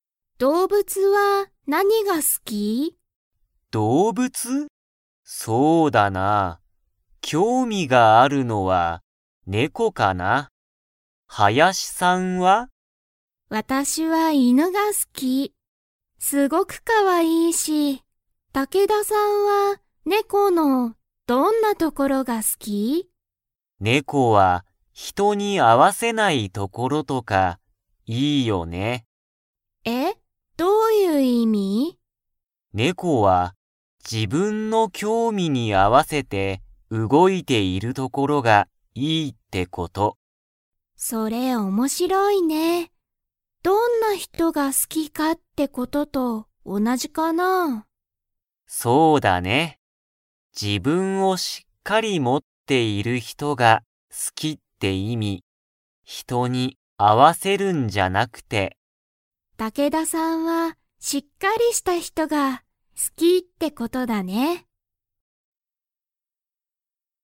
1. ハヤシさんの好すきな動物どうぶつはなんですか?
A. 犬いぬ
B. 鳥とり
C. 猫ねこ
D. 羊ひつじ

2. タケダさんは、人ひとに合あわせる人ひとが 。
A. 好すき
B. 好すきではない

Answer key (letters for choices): 1A, 2B

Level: Level 3